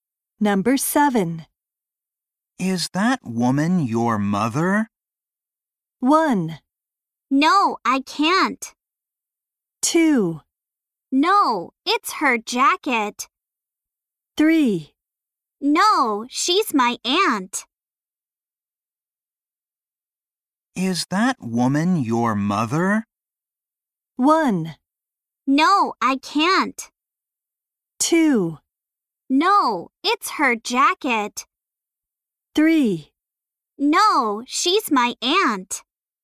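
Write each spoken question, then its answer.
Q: Is that woman your mother?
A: 3: No, she's my aunt.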